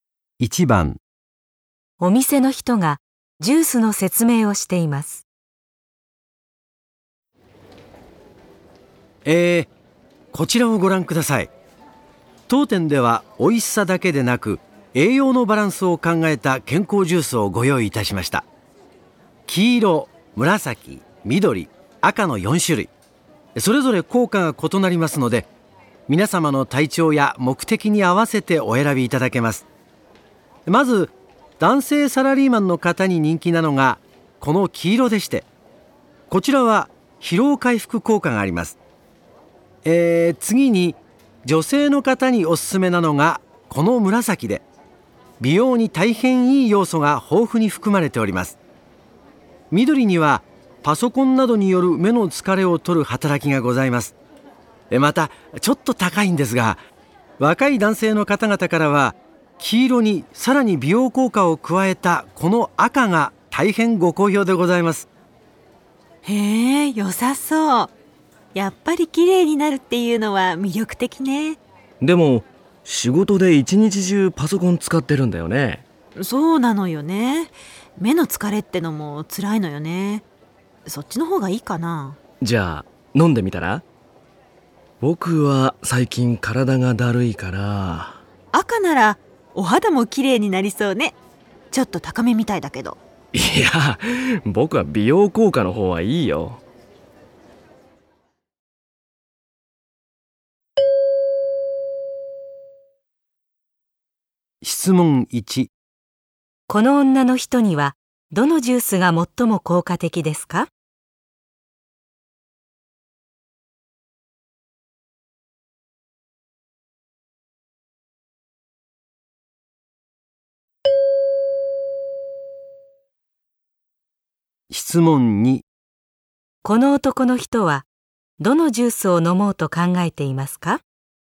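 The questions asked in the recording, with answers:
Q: どのジュースを飲もうと考えていますか?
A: 黄色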